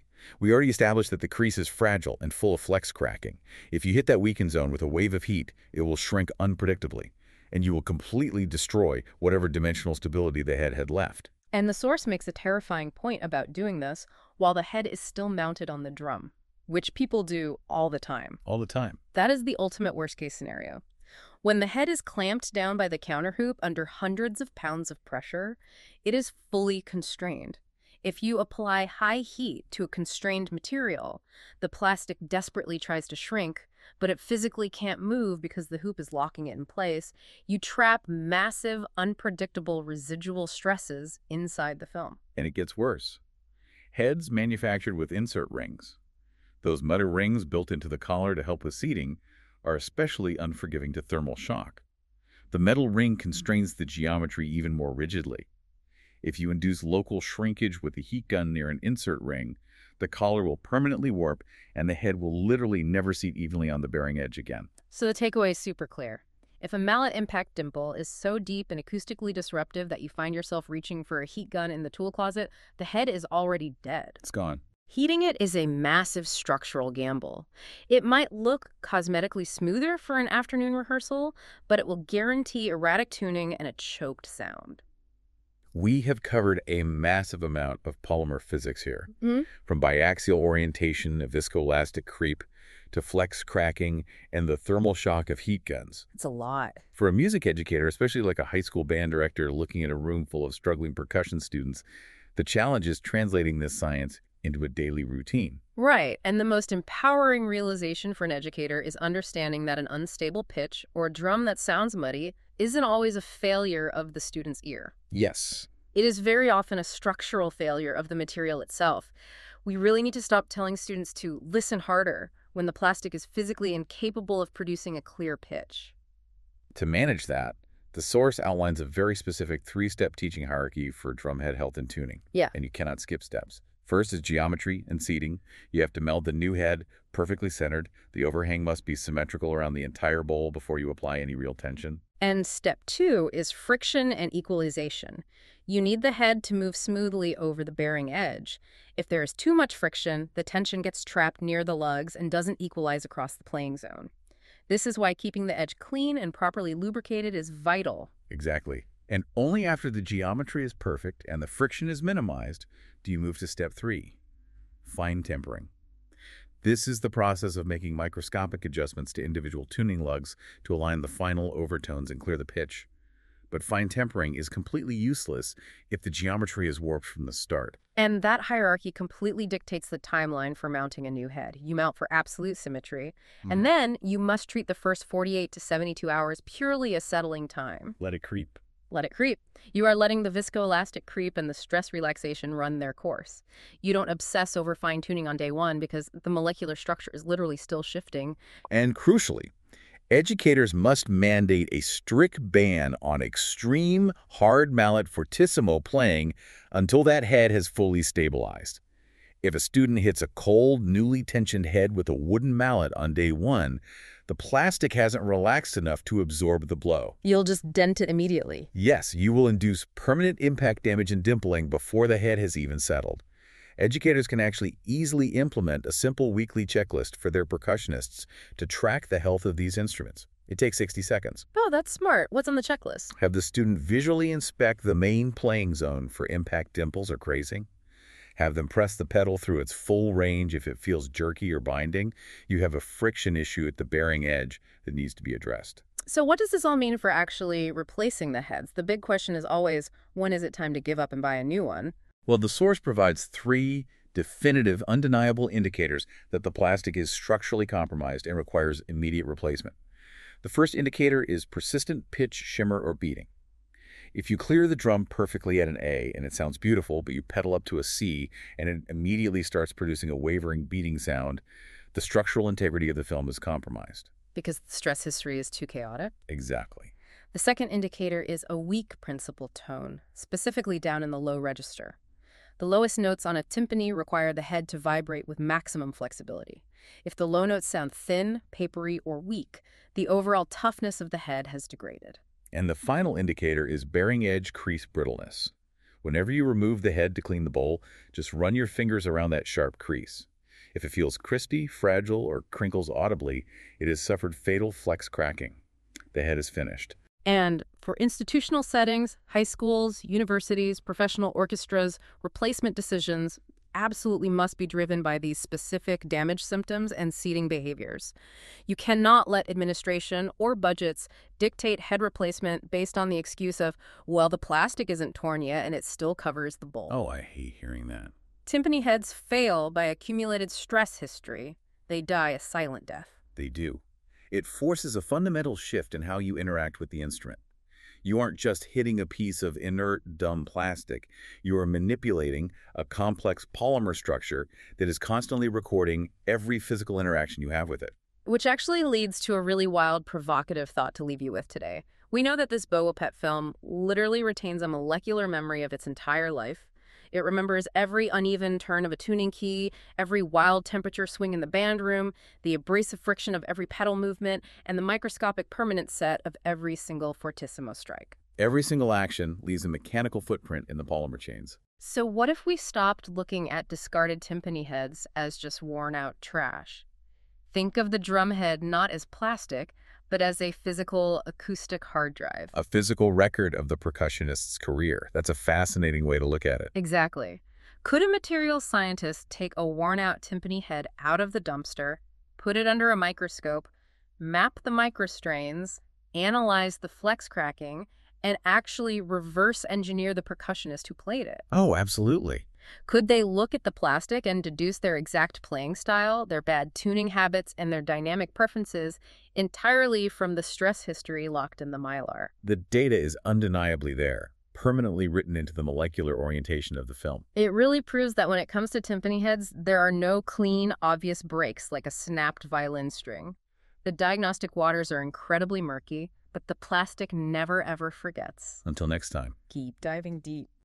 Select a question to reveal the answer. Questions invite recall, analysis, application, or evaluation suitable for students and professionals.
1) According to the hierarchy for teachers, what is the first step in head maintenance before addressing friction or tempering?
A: Geometry and seating.

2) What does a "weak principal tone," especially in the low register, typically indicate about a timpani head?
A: The head is worn out or structurally compromised.

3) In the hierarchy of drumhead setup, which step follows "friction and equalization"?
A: Fine tempering.